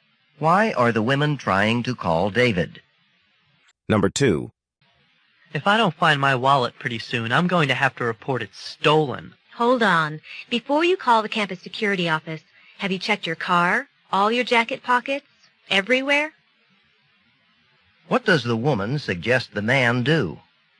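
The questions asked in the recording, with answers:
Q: What does the woman suggest the man do?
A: Look everywhere for his wallet before reporting it stolen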